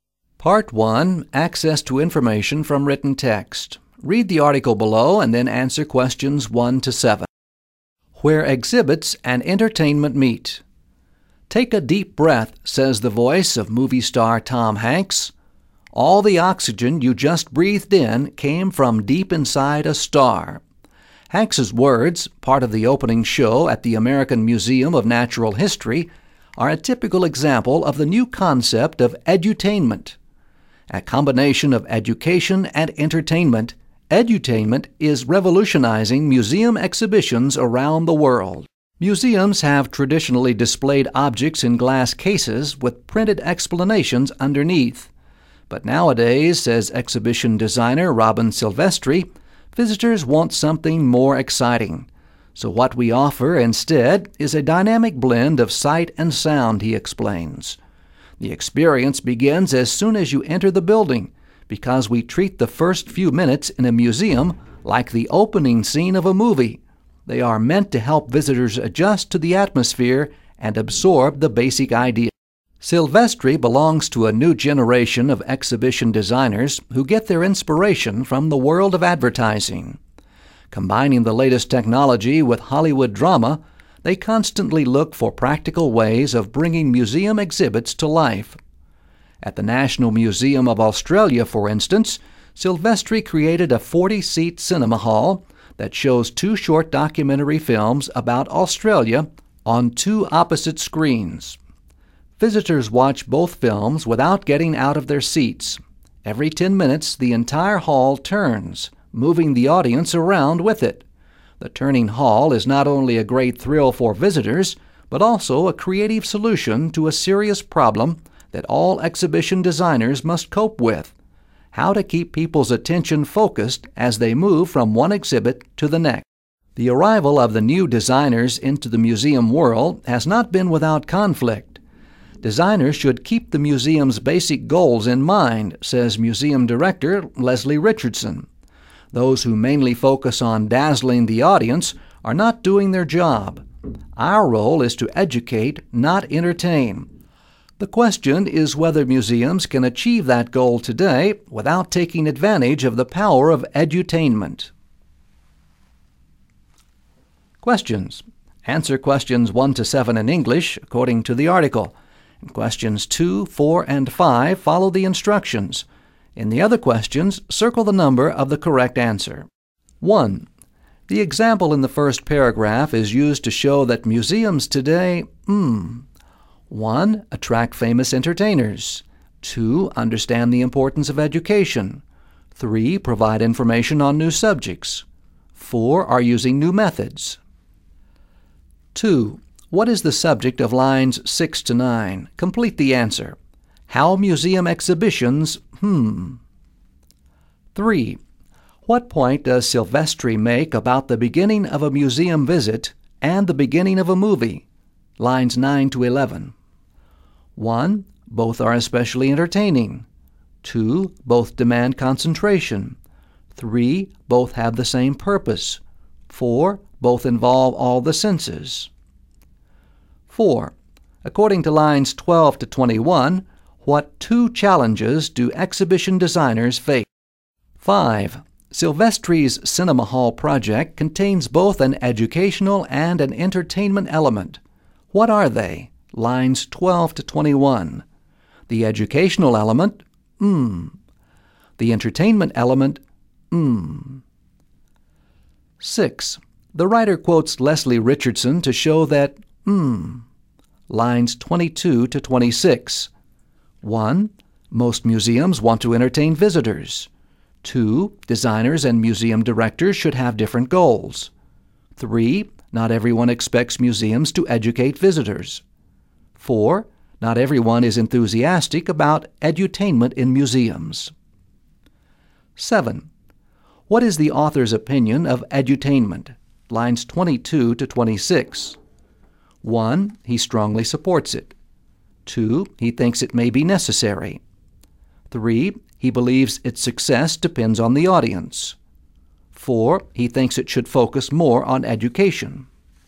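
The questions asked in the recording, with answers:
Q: The example in the first paragraph is used to show that museums today,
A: 4: Are using new methods.

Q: What is the subject of lines 6 to 9? Complete the answer. How museum exhibitions,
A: have changed (from glass cases to a blend of sight and sound)

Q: What point does Silvestri make about the beginning of a museum visit and the beginning of a movie?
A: 3: Both have the same purpose.

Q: According to lines 12 to 21, what two challenges do exhibition designers face?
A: Bringing museum exhibits to life, and keeping people's attention focused as they move from one exhibit to the next

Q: Silvestri's cinema hall project contains both an educational and an entertainment element. What are they?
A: Educational: documentary films about Australia; entertainment: the turning hall

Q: The writer quotes Leslie Richardson to show that,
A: 4: Not everyone is enthusiastic about edutainment in museums.

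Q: What is the author's opinion of edutainment?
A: 2: He thinks it may be necessary.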